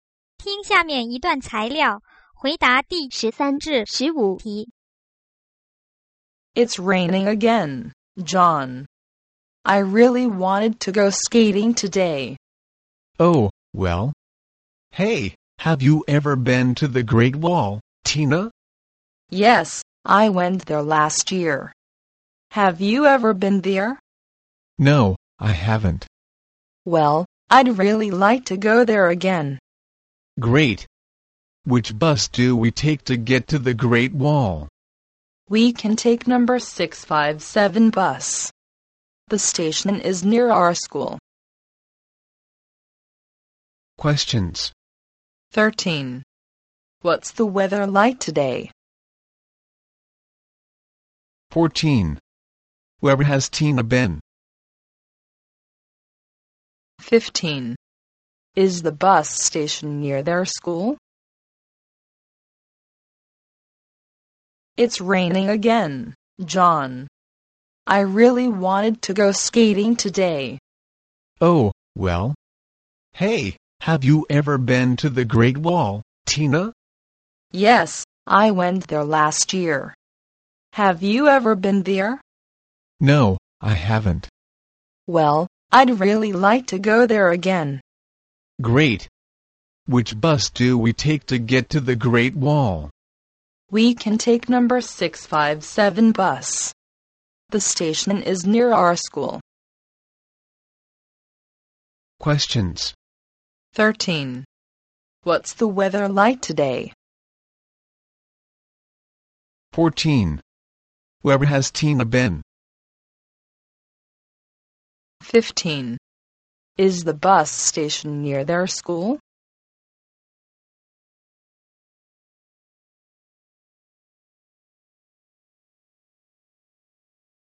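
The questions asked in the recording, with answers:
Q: 13. What's the weather like today?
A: Rainy

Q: 14. Where has Tina been?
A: The Great Wall

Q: 15.Is the bus station near their school?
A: Yes, it is.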